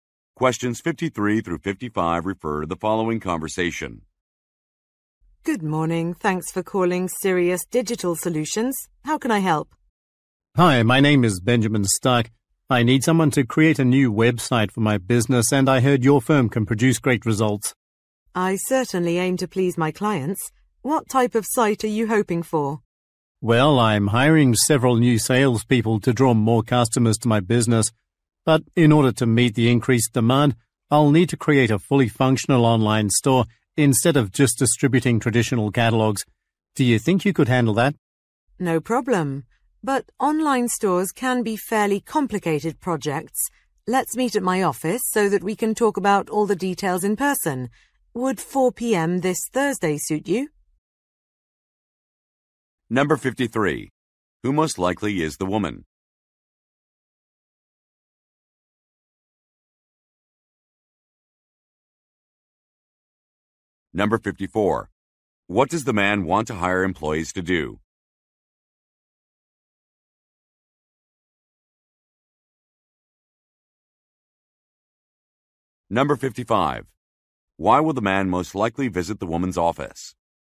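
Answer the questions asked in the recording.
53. A website designer
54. Draw more customers to his business
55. To discuss the details of the project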